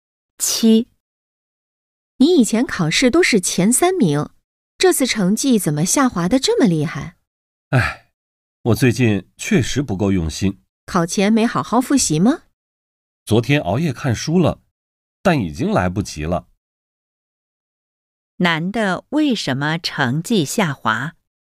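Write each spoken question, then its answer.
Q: 男的为什么成绩下滑?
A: 最近不够用心,没好好复习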